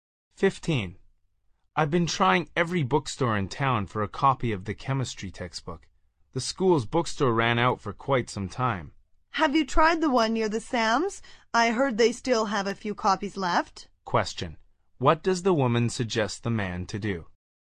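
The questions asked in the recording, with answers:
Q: What does the woman suggest the man to do?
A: Try the bookstore near the Sam's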